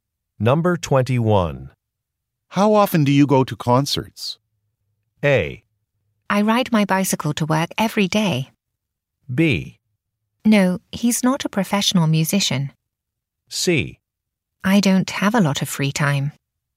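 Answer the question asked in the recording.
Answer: C: I don't have a lot of free time.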